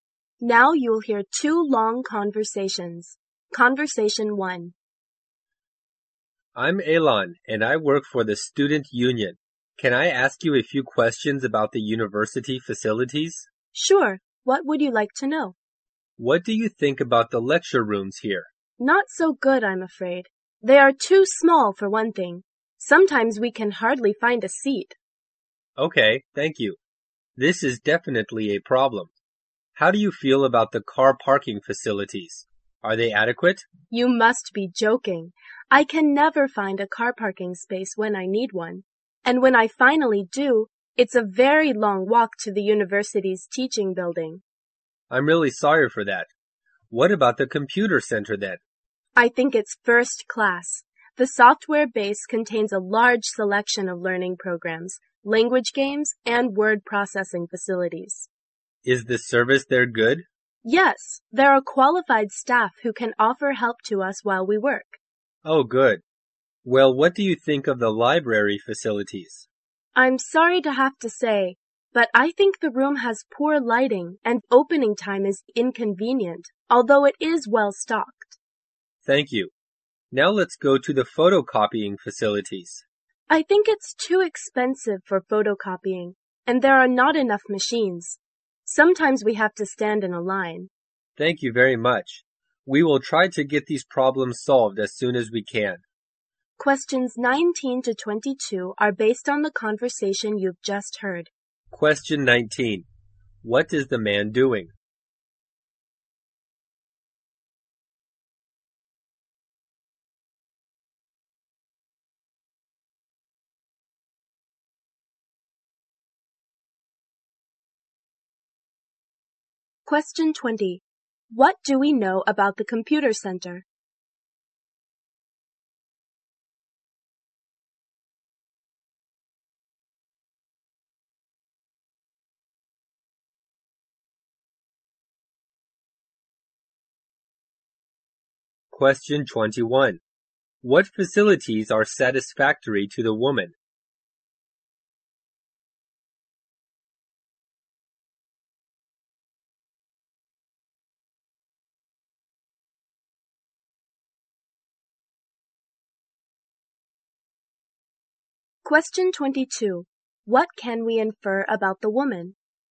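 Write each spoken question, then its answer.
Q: What is the man doing?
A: Surveying students' opinions on university facilities

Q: What do we know about the computer center?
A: It's first class, with many programs and qualified staff

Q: What facilities are satisfactory to the woman?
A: The computer center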